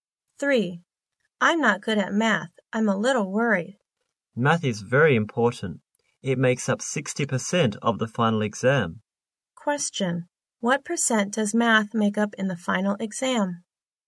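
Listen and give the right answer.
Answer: 60%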